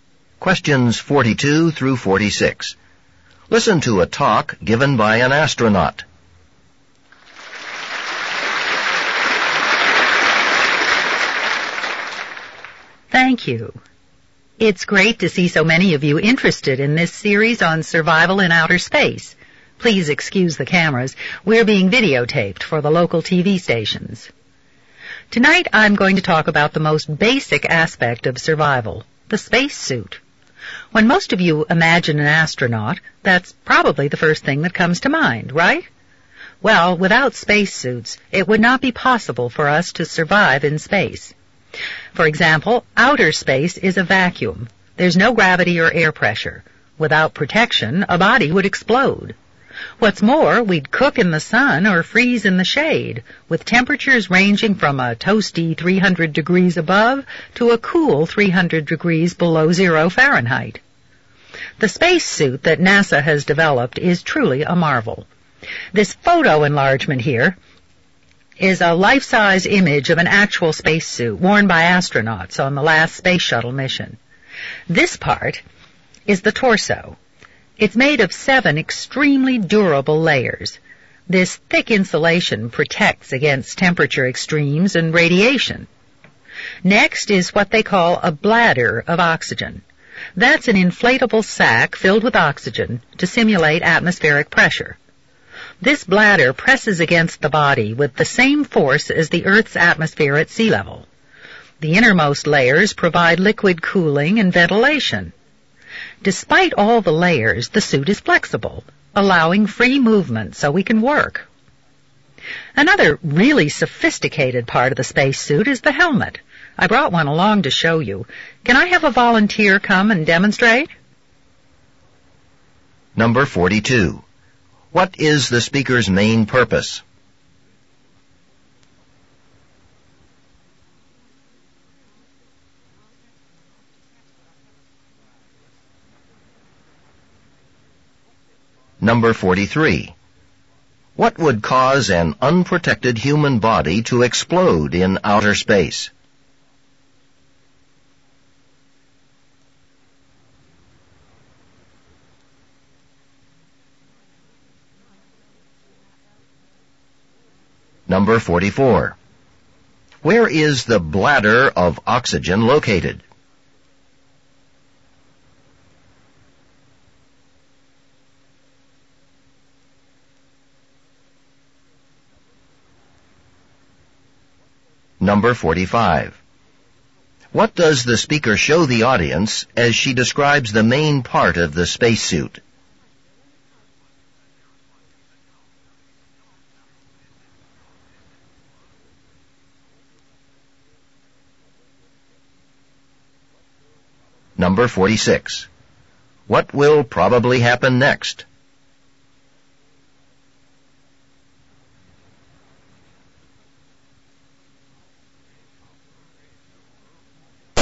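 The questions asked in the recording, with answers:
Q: What is the speaker's main purpose?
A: To explain how the spacesuit helps astronauts survive in space

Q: What would cause an unprotected human body to explode in outer space?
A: The vacuum: no air pressure

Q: Where is the bladder of oxygen located?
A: In the torso, among its layers

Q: What does the speaker show the audience as she describes the main part of the spacesuit?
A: A life-size photo enlargement of a spacesuit

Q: What will probably happen next?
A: A volunteer will demonstrate the helmet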